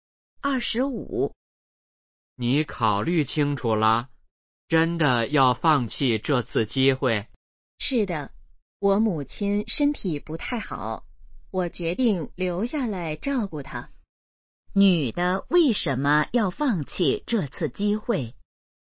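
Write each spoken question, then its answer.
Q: 女的为什么要放弃这次机会?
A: 要照顾母亲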